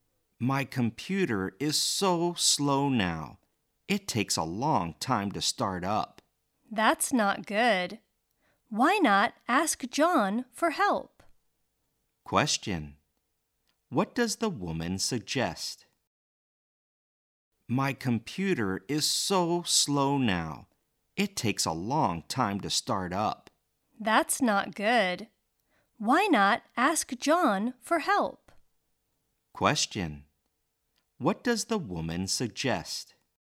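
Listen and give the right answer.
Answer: Ask John for help with the slow computer.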